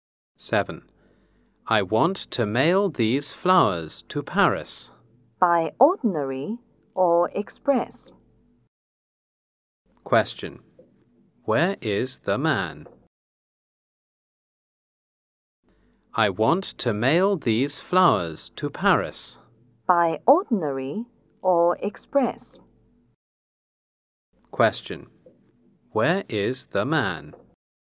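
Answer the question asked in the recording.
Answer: At the post office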